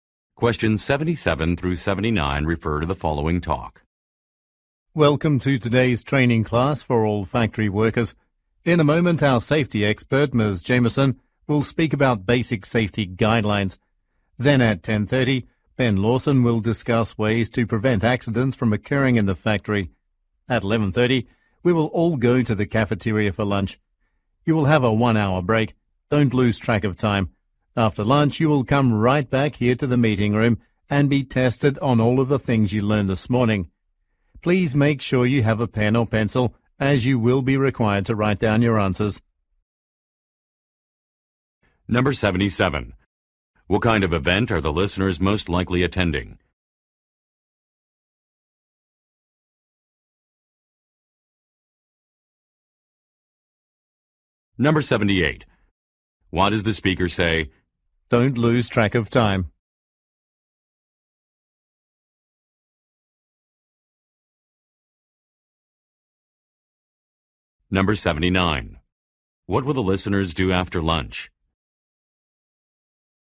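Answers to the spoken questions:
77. A safety training class for factory workers
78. To remind them to come back when the one-hour lunch break ends
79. Take a written test on what they learned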